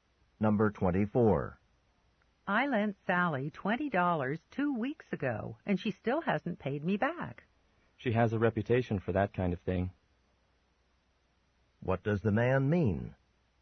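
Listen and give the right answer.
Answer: Sally often doesn't pay back money she borrows.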